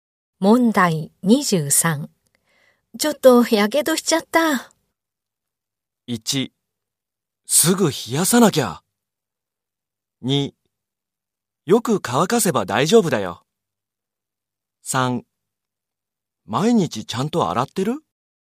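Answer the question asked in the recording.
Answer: 1: すぐ冷やさなきゃ。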